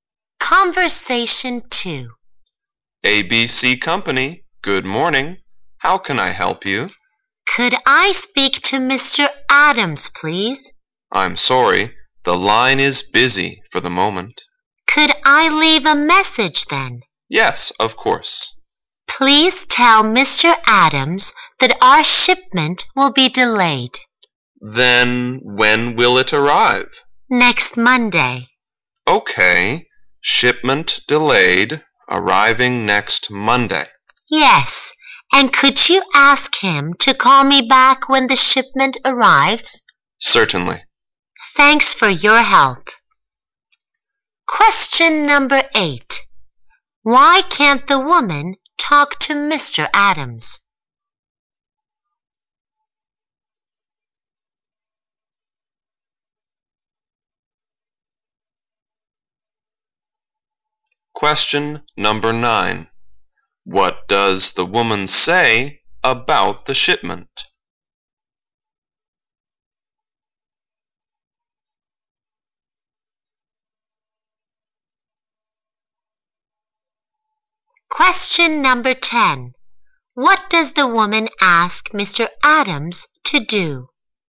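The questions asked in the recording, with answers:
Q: Why can't the woman talk to Mr. Adams?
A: His line is busy

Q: What does the woman say about the shipment?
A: It will be delayed until next Monday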